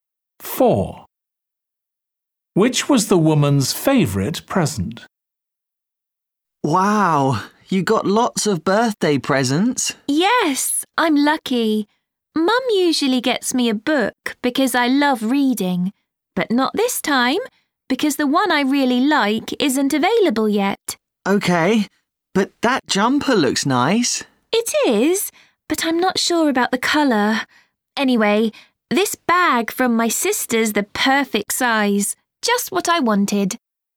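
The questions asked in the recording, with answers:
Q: Which was the woman's favourite present?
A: the bag from her sister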